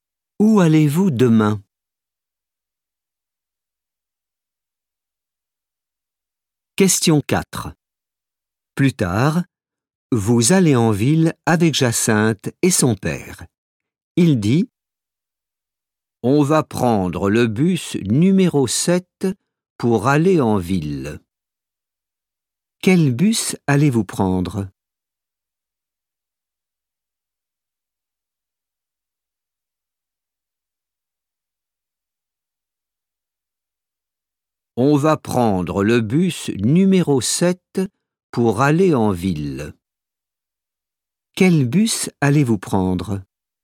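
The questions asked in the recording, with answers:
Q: Quel bus allez-vous prendre ?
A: le bus numéro 7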